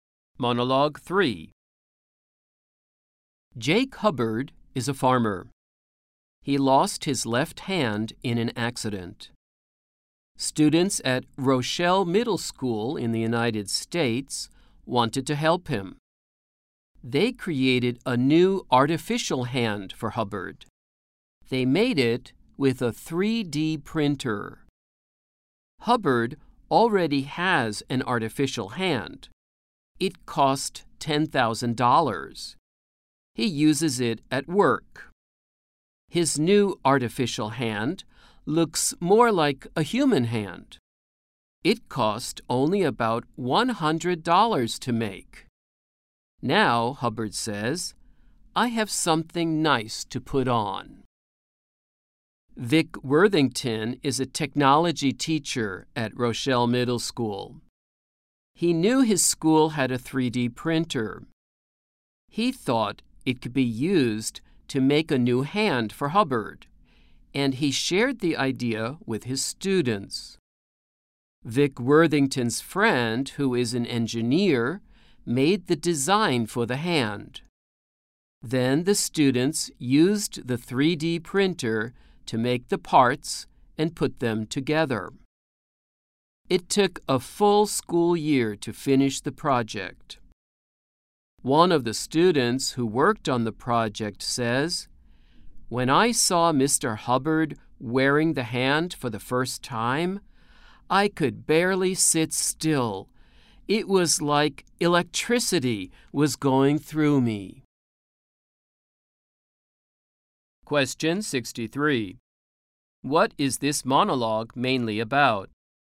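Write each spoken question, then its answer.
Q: What is this monologue mainly about?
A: Students making an artificial hand for a farmer with a 3D printer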